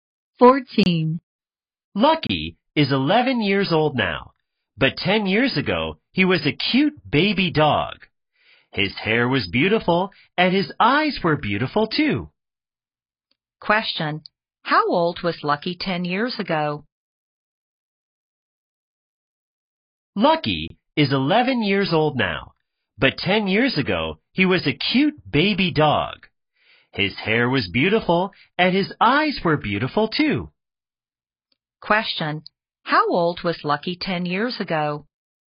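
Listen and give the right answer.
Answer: One year old.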